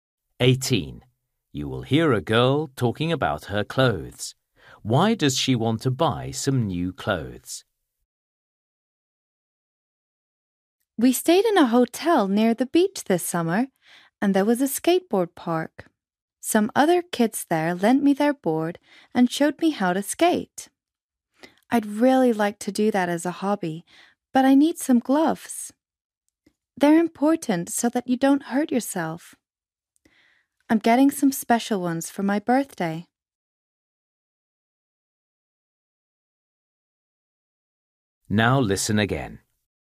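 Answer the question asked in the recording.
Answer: She wants to take up skateboarding and needs gloves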